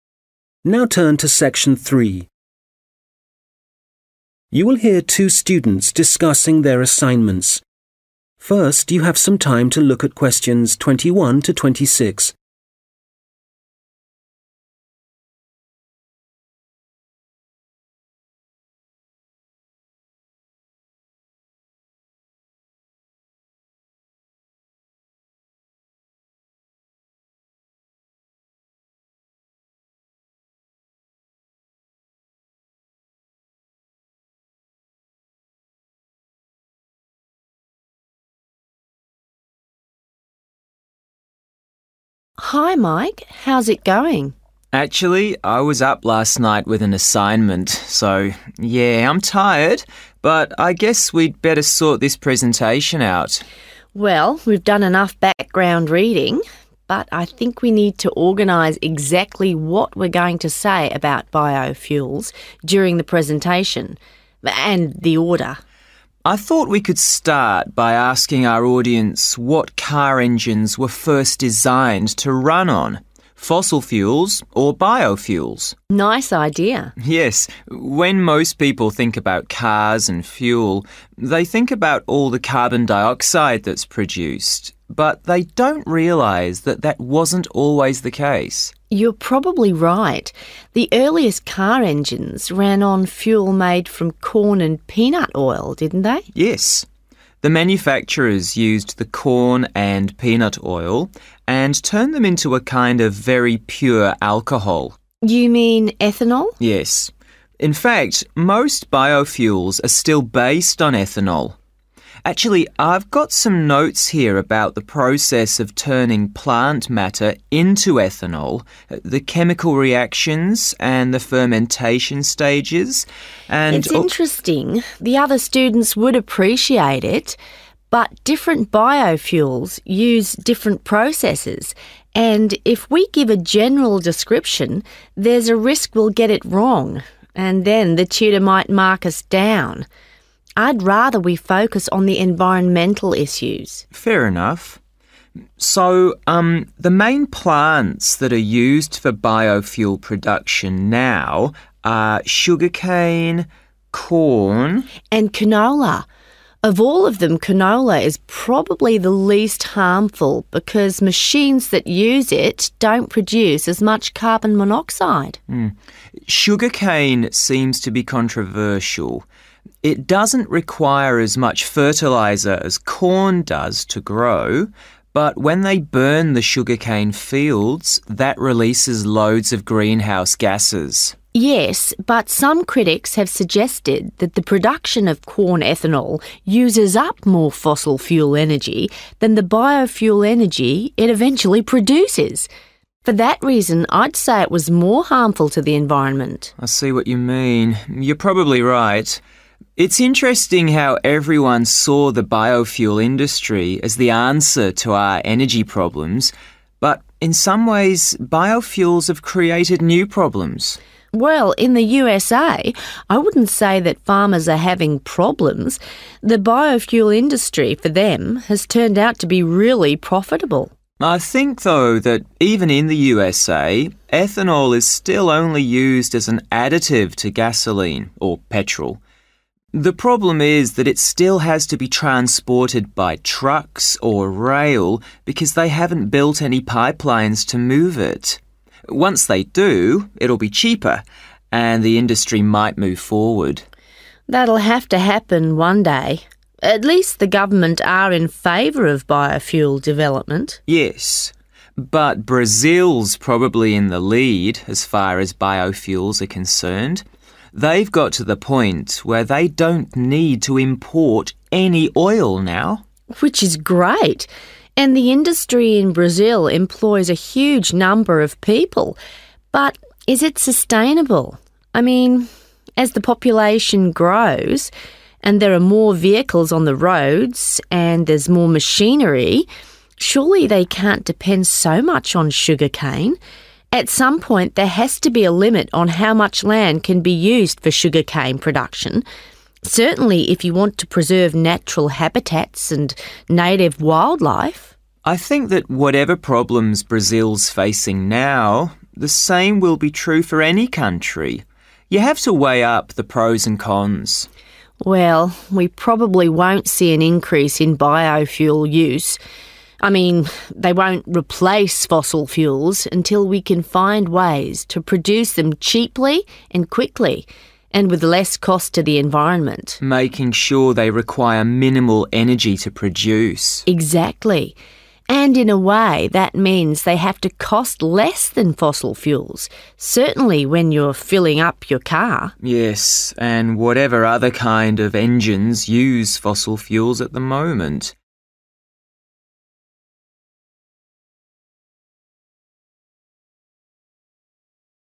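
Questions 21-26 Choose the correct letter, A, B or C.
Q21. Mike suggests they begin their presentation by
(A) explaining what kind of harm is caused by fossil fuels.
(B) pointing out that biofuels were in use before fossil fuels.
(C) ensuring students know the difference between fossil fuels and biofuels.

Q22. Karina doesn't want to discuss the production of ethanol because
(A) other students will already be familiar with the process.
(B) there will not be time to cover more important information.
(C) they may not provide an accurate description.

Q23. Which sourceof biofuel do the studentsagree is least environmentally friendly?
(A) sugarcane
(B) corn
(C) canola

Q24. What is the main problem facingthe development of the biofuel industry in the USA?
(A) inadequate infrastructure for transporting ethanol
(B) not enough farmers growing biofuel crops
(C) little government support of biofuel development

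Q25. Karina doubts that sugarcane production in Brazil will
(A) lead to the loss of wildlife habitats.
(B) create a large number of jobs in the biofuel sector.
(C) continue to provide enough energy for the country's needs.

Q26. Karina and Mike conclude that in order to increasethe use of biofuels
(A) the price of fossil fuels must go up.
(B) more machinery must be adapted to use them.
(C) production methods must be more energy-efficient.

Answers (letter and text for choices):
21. (B) pointing out that biofuels were in use before fossil fuels.
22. (C) they may not provide an accurate description.
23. (B) corn
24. (A) inadequate infrastructure for transporting ethanol
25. (C) continue to provide enough energy for the country's needs.
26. (C) production methods must be more energy-efficient.

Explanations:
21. Karina: You're probably right. The earliest car engines ran on fuel made from corn and peanut oil, didn't they? 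(Có lẽ bạn nói đúng. Động cơ ô tô đầu tiên được chạy bằng nhiên liệu làm từ dầu ngô và đậu phộng, có phải không nhỉ?)
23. Karina: Yes, but some critics have suggested that the production of corn ethanol uses up more fossil fuel energy than the biofuel energy it eventually produces. For that reason, I'd say it was more harmful to the environment. (việc sản xuất ethanol từ ngô sử dụng nhiều năng lượng nhiên liệu hóa thạch hơn năng lượng nhiên liệu sinh học cuối cùng được tạo ra. Do đó, tôi cho rằng nó có hại hơn đối với môi trường.)
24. Mike: I think, though, that even in the USA, ethanol is still only used as an additive to gasoline, or petrol. The problem is that it still has to be transported by trucks or rail because they haven't built any pipelines to move it. (Vấn đề là nó vẫn cần phải được vận chuyển bằng xe tải hoặc đường sắt vì họ chưa xây dựng đường ống để có thể vận chuyển nó.) Once they do, it'll be cheaper and the industry might move forward.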